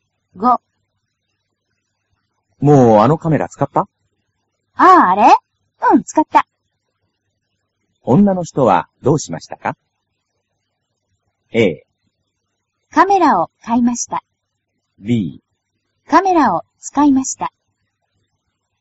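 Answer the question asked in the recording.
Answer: B: カメラを使いました。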